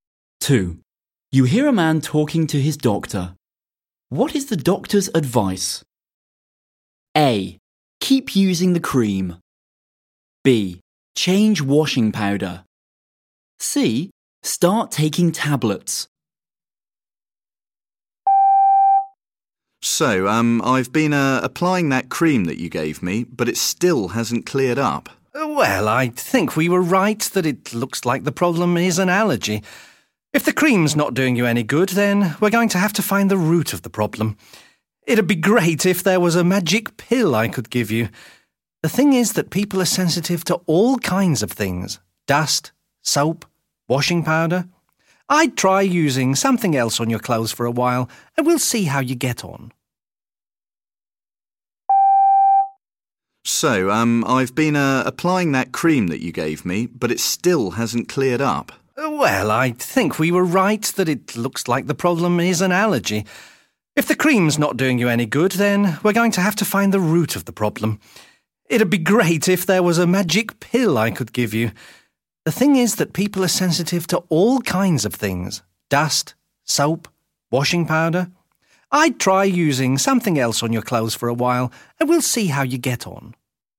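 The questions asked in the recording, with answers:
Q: What is the doctor's advice?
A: B: Change washing powder.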